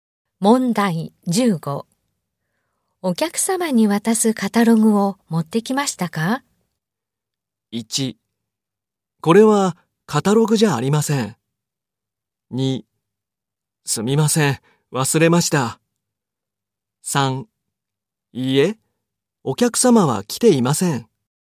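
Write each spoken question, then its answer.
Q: お客様に渡すカタログを持ってきましたか?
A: 2: すみません、忘れました。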